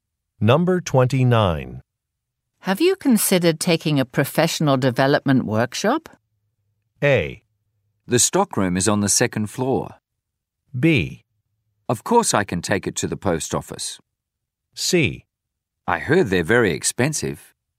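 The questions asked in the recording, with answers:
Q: Have you considered taking a professional development workshop?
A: C: I heard they're very expensive.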